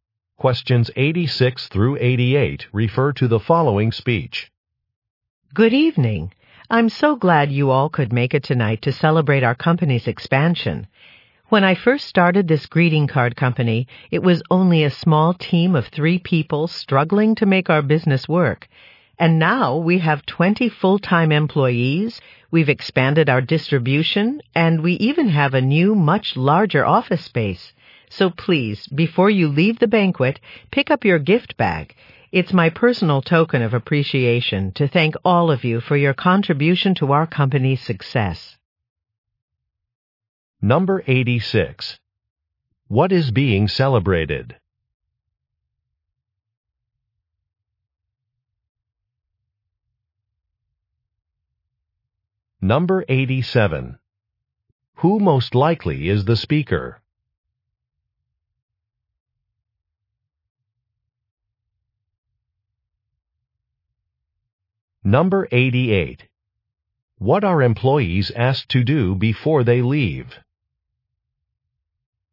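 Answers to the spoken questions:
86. The company's expansion.
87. The company founder/owner.
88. Pick up a gift bag.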